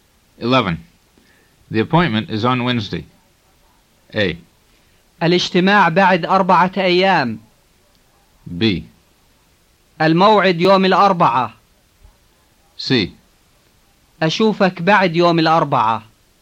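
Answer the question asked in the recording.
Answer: B: الموعد يوم الأربعاء.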